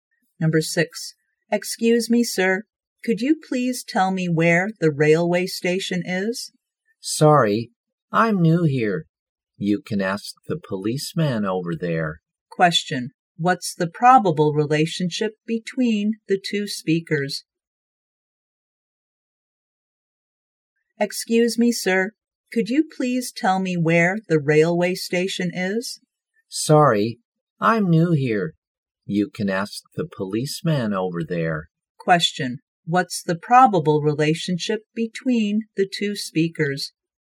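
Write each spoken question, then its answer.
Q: What's the probable relationship between the two speakers?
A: Strangers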